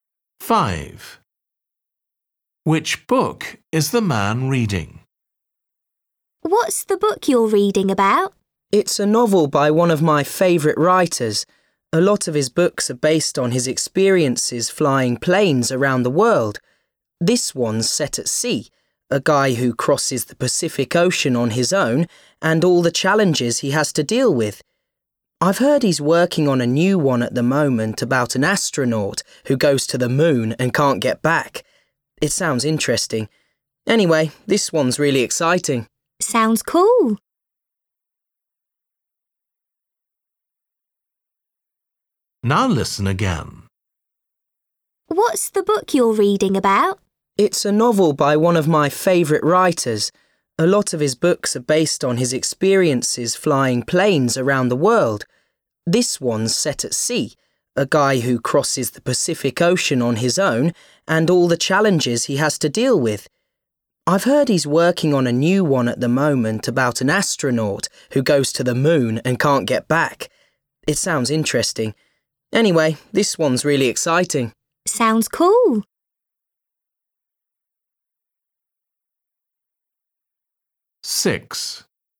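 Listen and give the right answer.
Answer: A novel about a man crossing the Pacific Ocean alone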